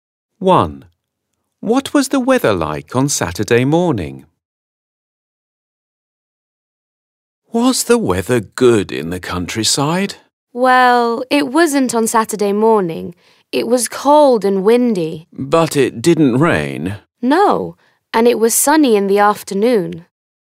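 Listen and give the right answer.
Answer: cold and windy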